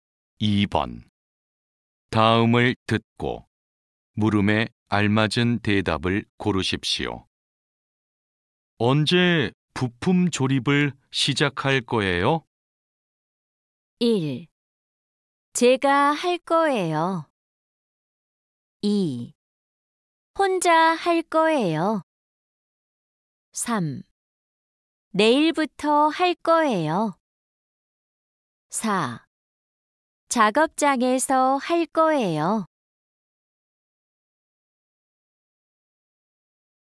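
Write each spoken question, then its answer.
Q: 언제 부품 조립을 시작할 거예요?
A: 3: 내일부터 할 거예요.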